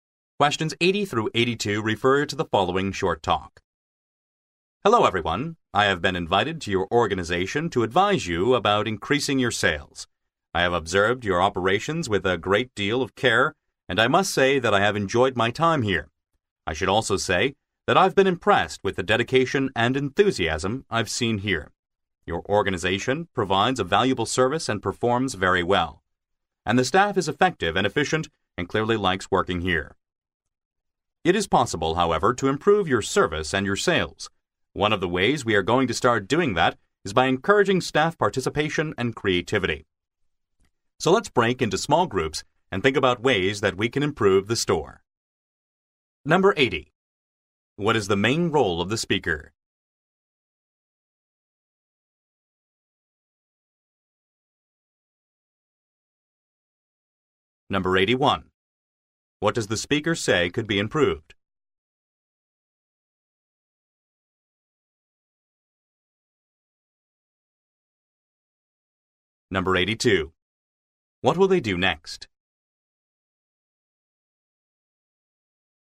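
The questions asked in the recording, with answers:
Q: What is the main role of the speaker?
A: An adviser (consultant) on increasing sales

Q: What does the speaker say could be improved?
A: The service and sales

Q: What will they do next?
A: Break into small groups to think of ways to improve the store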